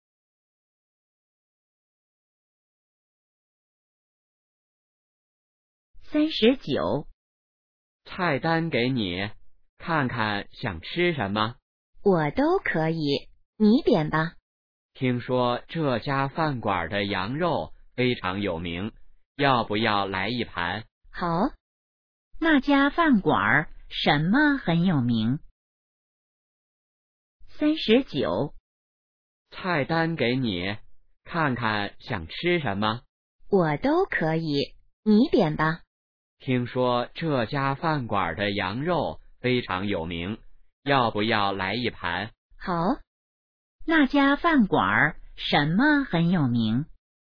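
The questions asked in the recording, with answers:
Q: 那家饭馆什么很有名?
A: 羊肉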